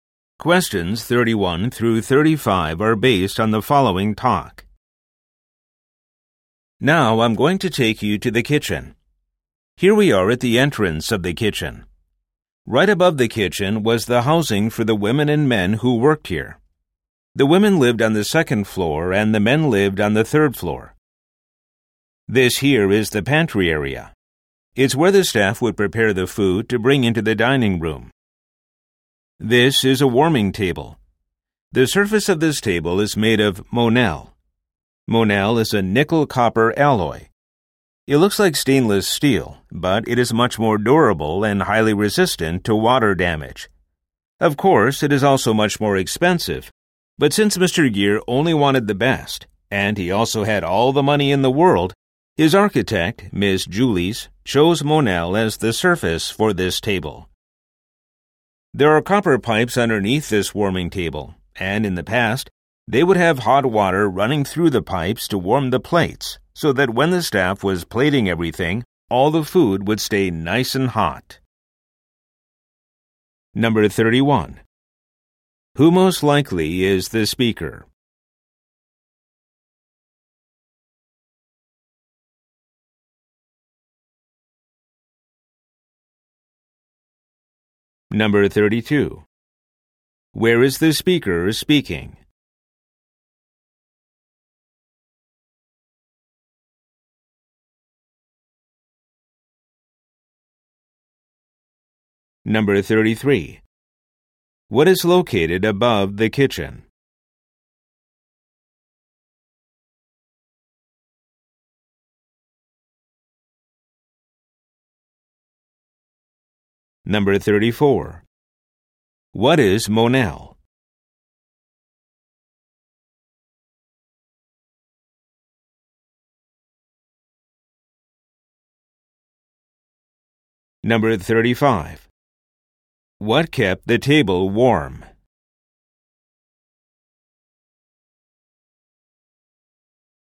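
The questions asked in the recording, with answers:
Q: Who most likely is the speaker?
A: A tour guide

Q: Where is the speaker speaking?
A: At the kitchen of a historic mansion

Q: What is located above the kitchen?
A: Housing for the staff who worked there

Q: What is Monel?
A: A nickel-copper alloy

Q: What kept the table warm?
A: Hot water running through copper pipes underneath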